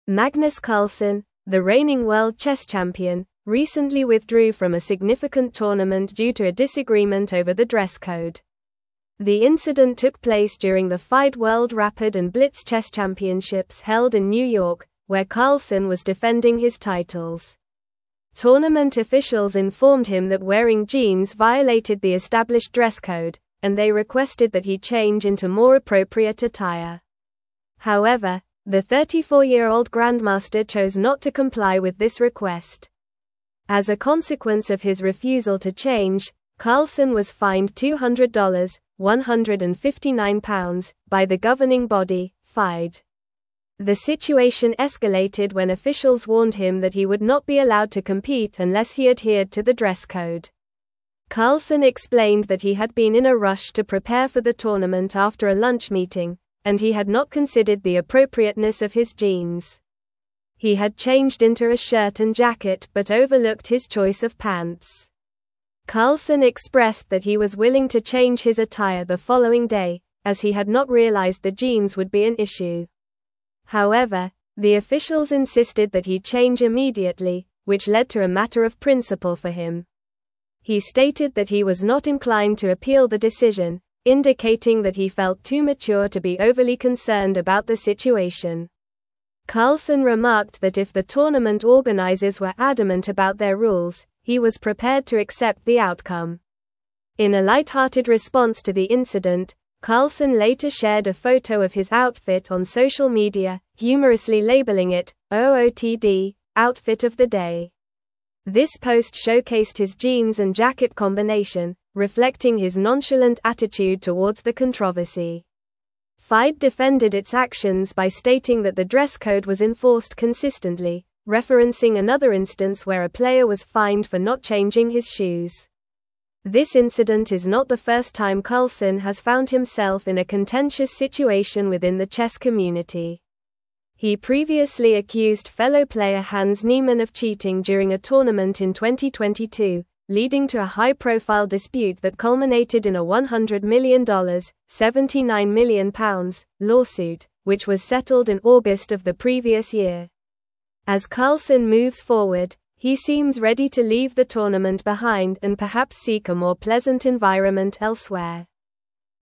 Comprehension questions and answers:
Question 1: Magnus Carlsen, the reigning world chess champion, recently withdrew from a significant (1)______ due to a (2)______ over the dress code.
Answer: tournament

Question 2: Magnus Carlsen, the reigning world chess champion, recently withdrew from a significant (1)______ due to a (2)______ over the dress code.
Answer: disagreement

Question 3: Tournament officials informed him that wearing jeans violated the established dress code, and they (3)______ that he (4)______ into more appropriate attire.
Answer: requested

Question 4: Tournament officials informed him that wearing jeans violated the established dress code, and they (3)______ that he (4)______ into more appropriate attire.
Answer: change

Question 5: The (5)______ escalated when officials (6)______ him that he would not be allowed to compete unless he adhered to the dress code.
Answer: situation

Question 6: The (5)______ escalated when officials (6)______ him that he would not be allowed to compete unless he adhered to the dress code.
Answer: warned

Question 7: Carlsen expressed that he was willing to change his attire the following day, as he had not (7)______ the jeans would be an issue.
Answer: realized

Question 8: However, the officials insisted that he change immediately, which led to a (8)______ of principle for him.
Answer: matter

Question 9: He stated that he was not inclined to appeal the decision, (9)______ that he felt too mature to be overly concerned about the situation.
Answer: indicating

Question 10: (10)______ remarked that if the tournament (11)______ were adamant about their rules, he was prepared to accept the outcome.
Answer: Carlsen

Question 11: (10)______ remarked that if the tournament (11)______ were adamant about their rules, he was prepared to accept the outcome.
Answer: organizers

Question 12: In a lighthearted response to the incident, Carlsen later shared a (12)______ of his outfit on social media, humorously labeling it "OOTD" (outfit of the day).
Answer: photo

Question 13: He previously accused (13)______ player Hans Niemann of cheating during a tournament in 2022, (14)______ to a high-profile dispute that culminated in a $100 million (£79 million) lawsuit, which was settled in August of the previous year.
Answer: fellow

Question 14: He previously accused (13)______ player Hans Niemann of cheating during a tournament in 2022, (14)______ to a high-profile dispute that culminated in a $100 million (£79 million) lawsuit, which was settled in August of the previous year.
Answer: leading

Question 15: As Carlsen moves forward, he seems ready to (15)______ the tournament behind and perhaps seek a more pleasant (16)______ elsewhere.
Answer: leave

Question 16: As Carlsen moves forward, he seems ready to (15)______ the tournament behind and perhaps seek a more pleasant (16)______ elsewhere.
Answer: environment

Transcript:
Magnus Carlsen, the reigning world chess champion, recently withdrew from a significant tournament due to a disagreement over the dress code. The incident took place during the FIDE World Rapid and Blitz Chess Championships held in New York, where Carlsen was defending his titles. Tournament officials informed him that wearing jeans violated the established dress code, and they requested that he change into more appropriate attire. However, the 34-year-old grandmaster chose not to comply with this request.
As a consequence of his refusal to change, Carlsen was fined $200 (£159) by the governing body, FIDE. The situation escalated when officials warned him that he would not be allowed to compete unless he adhered to the dress code. Carlsen explained that he had been in a rush to prepare for the tournament after a lunch meeting, and he had not considered the appropriateness of his jeans. He had changed into a shirt and jacket but overlooked his choice of pants.
Carlsen expressed that he was willing to change his attire the following day, as he had not realized the jeans would be an issue. However, the officials insisted that he change immediately, which led to a matter of principle for him. He stated that he was not inclined to appeal the decision, indicating that he felt too mature to be overly concerned about the situation. Carlsen remarked that if the tournament organizers were adamant about their rules, he was prepared to accept the outcome.
In a lighthearted response to the incident, Carlsen later shared a photo of his outfit on social media, humorously labeling it "OOTD" (outfit of the day). This post showcased his jeans and jacket combination, reflecting his nonchalant attitude towards the controversy. FIDE defended its actions by stating that the dress code was enforced consistently, referencing another instance where a player was fined for not changing his shoes.
This incident is not the first time Carlsen has found himself in a contentious situation within the chess community. He previously accused fellow player Hans Niemann of cheating during a tournament in 2022, leading to a high-profile dispute that culminated in a $100 million (£79 million) lawsuit, which was settled in August of the previous year. As Carlsen moves forward, he seems ready to leave the tournament behind and perhaps seek a more pleasant environment elsewhere.

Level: Level 4